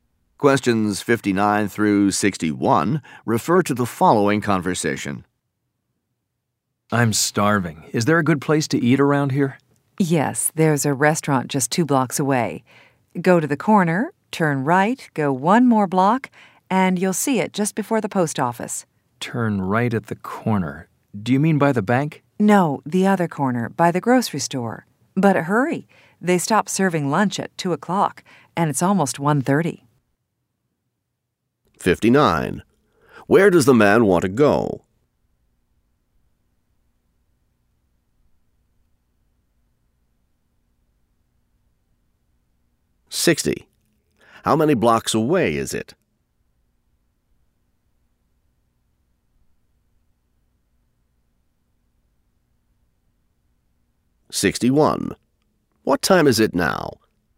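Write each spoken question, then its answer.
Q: Where does the man want to go?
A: To a restaurant

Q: How many blocks away is it?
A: Two

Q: What time is it now?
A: Almost 1:30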